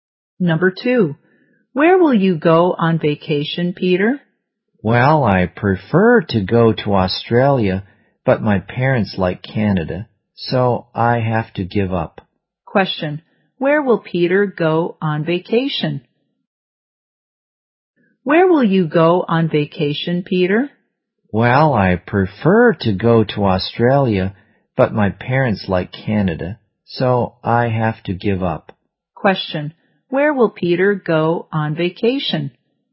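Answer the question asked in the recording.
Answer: Canada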